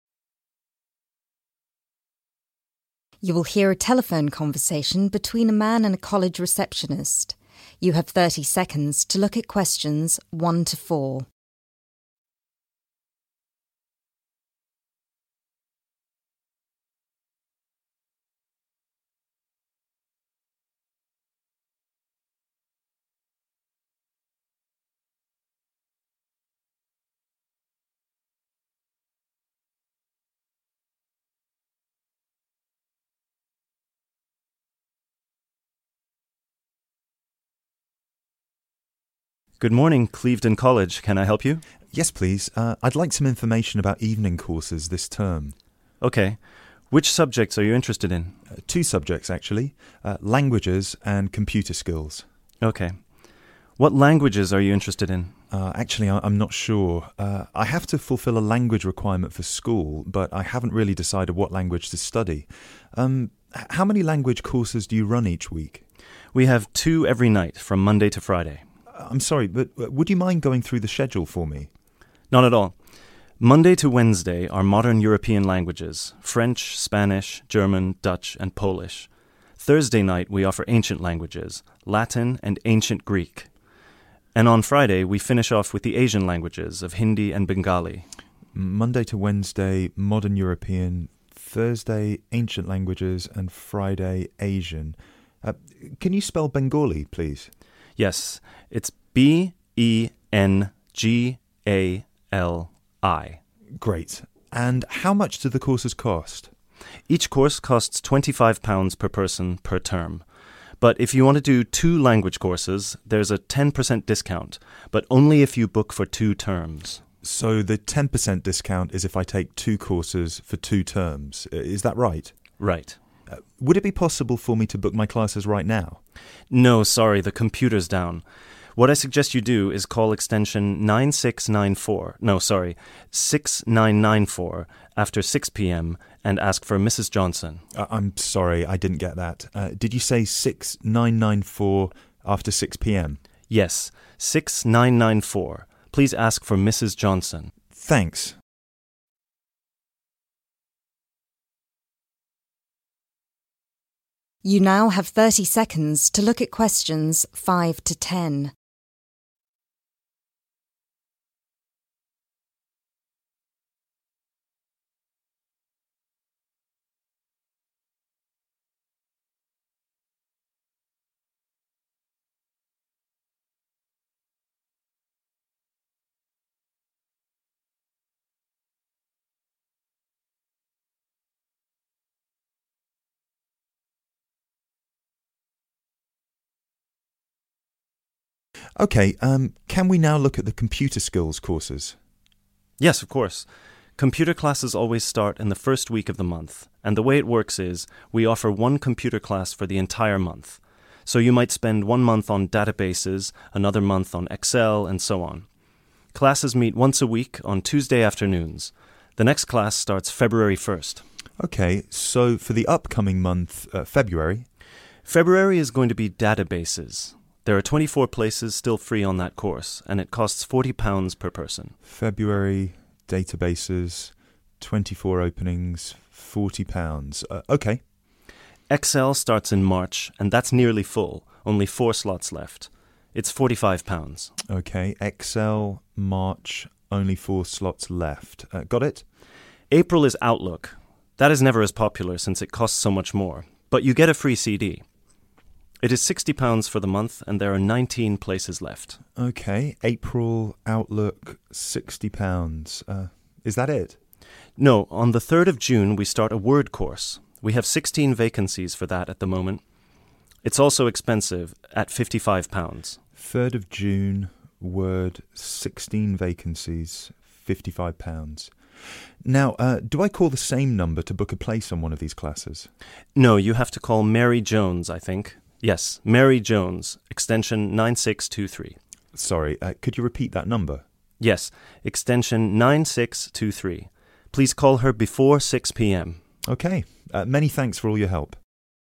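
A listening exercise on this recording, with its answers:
Complete the form below. Write NO MORE THAN TWO WORDS AND/OR A NUMBER for each answer.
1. Ancient languages: Latin and 1.......................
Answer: ancient Greek

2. Asian Languages: Hindi and 2..................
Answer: Bengali

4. To reserve a place in a language class, telephone Mrs Johnson on extension 4...............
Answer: 6994

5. 1st February | 5.................. | 24 | £40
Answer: databases

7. April | Outlook | 19 | 7..............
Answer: £60

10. To book a place on a computer course, call Mary Jones before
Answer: 6 p.m.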